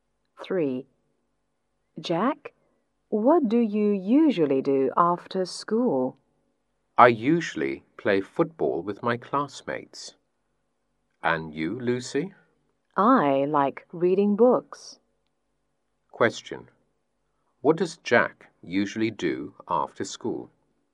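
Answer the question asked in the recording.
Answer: He plays football with his classmates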